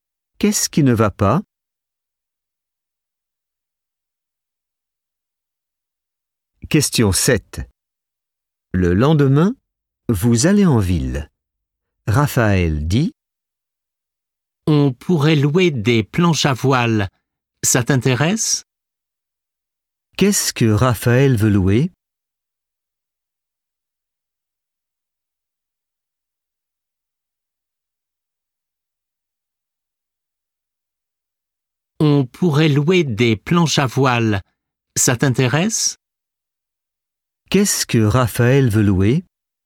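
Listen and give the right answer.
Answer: des planches à voile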